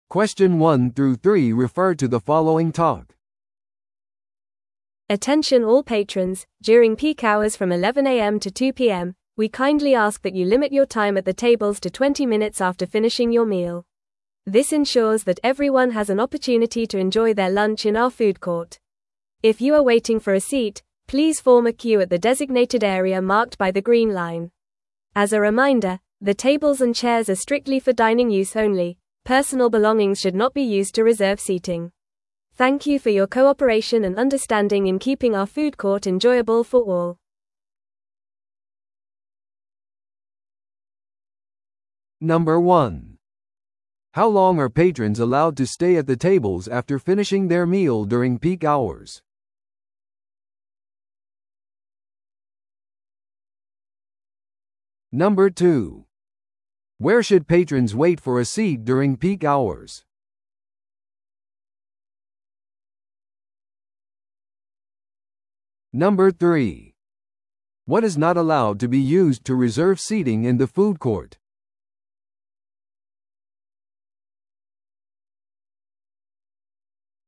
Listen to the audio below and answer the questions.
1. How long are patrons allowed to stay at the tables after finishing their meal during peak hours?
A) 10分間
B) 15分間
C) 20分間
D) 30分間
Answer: 20分間

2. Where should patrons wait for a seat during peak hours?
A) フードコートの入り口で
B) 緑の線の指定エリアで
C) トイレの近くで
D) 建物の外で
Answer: 緑の線の指定エリアで

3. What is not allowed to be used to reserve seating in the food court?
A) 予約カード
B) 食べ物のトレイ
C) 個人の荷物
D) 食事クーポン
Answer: 個人の荷物

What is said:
Attention all patrons, during peak hours from 11am to 2pm, we kindly ask that you limit your time at the tables to 20 minutes after finishing your meal. This ensures that everyone has an opportunity to enjoy their lunch in our food court. If you are waiting for a seat, please form a queue at the designated area marked by the green line. As a reminder, the tables and chairs are strictly for dining use only; personal belongings should not be used to reserve seating. Thank you for your cooperation and understanding in keeping our food court enjoyable for all.

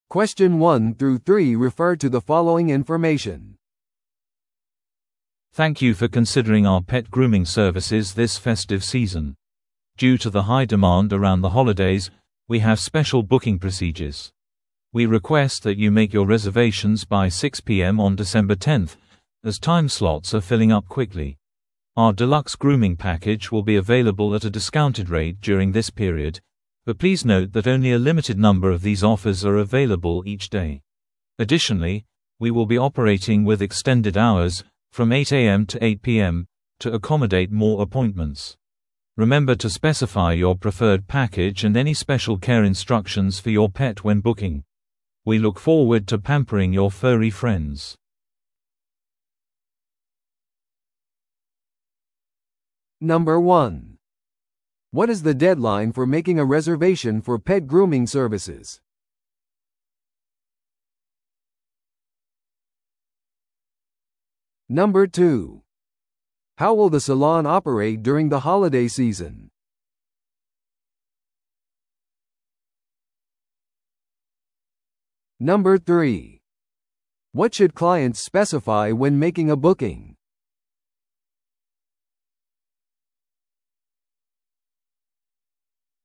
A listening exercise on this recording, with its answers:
Listen to the audio below and answer the questions.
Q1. What is the deadline for making a reservation for pet grooming services?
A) 12月5日の6pm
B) 12月10日の6pm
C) 12月15日の6pm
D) 12月20日の6pm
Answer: 12月10日の6pm

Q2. How will the salon operate during the holiday season?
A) 短縮時間で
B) 通常時間で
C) 閉店する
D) 時間を延長して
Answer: 時間を延長して

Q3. What should clients specify when making a booking?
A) ペットの種類と年齢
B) シャンプーと香水の選択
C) 希望のパッケージと特別なお手入れの指示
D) 支払い方法と交通手段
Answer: 希望のパッケージと特別なお手入れの指示

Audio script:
Thank you for considering our pet grooming services this festive season. Due to the high demand around the holidays, we have special booking procedures. We request that you make your reservations by 6pm on December 10th, as time slots are filling up quickly. Our deluxe grooming package will be available at a discounted rate during this period, but please note that only a limited number of these offers are available each day. Additionally, we will be operating with extended hours, from 8am to 8pm, to accommodate more appointments. Remember to specify your preferred package and any special care instructions for your pet when booking. We look forward to pampering your furry friends!

